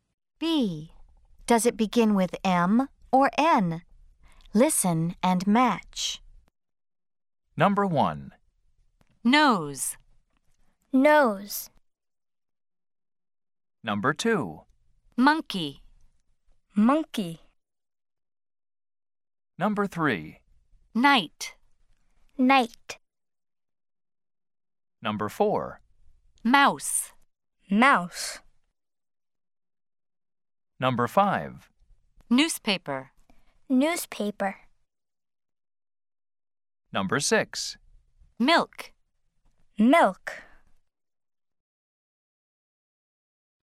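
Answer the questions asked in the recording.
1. N (Nose)
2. M (Monkey)
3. N (Night)
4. M (Mouse)
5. N (Newspaper)
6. M (Milk)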